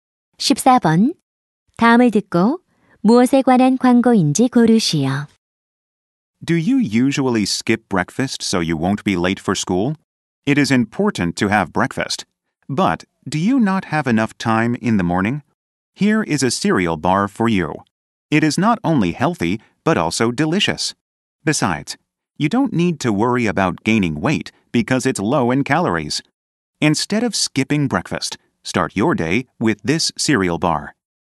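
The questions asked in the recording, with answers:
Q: 다음을 듣고 무엇에 관한 광고인지 고르시오.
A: 시리얼 바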